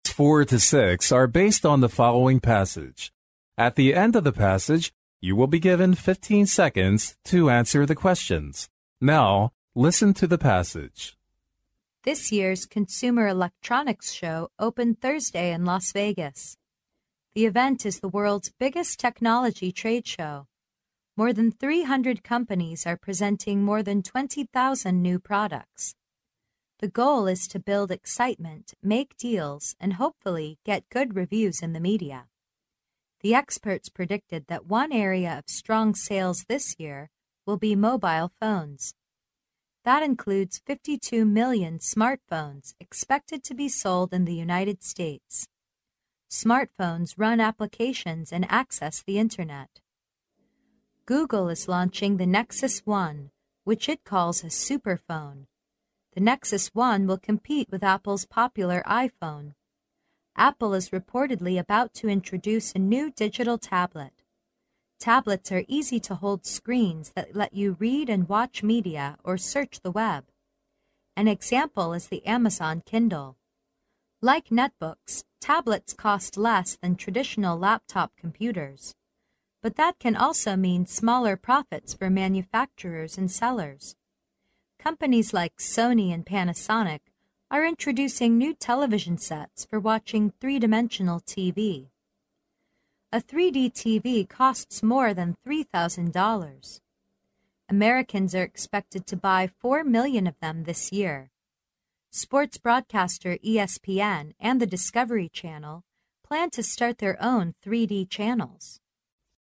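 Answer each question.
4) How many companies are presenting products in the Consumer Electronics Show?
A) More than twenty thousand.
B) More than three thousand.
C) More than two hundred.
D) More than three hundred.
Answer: D

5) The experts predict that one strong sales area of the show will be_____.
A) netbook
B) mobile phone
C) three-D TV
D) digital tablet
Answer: B

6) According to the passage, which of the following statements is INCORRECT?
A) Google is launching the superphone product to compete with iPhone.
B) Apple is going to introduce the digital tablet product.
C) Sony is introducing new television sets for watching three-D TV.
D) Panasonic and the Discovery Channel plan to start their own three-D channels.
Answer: D

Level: 英语四级

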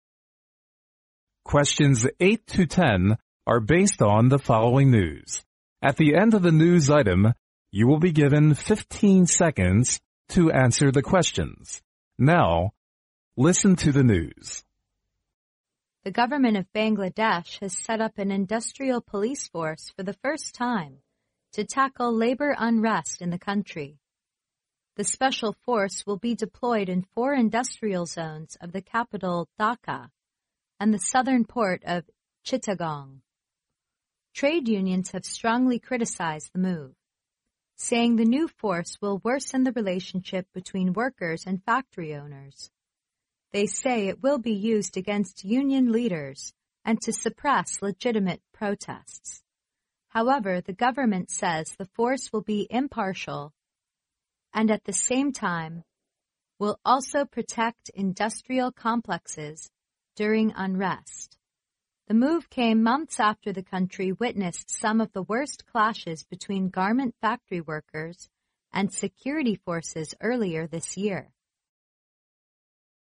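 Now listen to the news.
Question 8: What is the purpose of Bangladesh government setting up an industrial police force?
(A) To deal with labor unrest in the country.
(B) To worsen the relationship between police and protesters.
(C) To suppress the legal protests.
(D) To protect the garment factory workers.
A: A

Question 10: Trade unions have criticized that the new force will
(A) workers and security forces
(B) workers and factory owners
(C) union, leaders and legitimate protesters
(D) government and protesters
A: B

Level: 英语四级

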